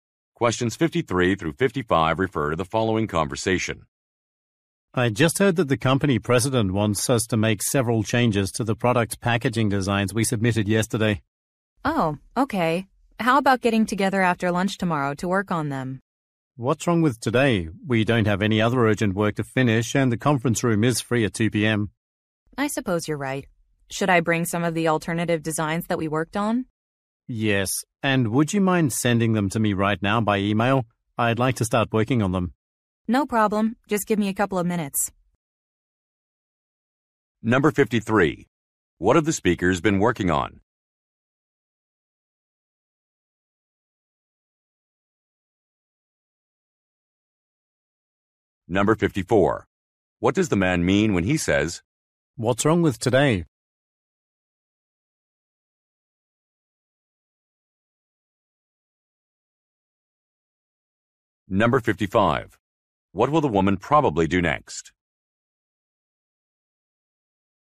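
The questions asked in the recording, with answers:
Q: What have the speakers been working on?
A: Product packaging designs

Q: What does the man mean when he says,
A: He wants to work on the changes today

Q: What will the woman probably do next?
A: Email the alternative designs to the man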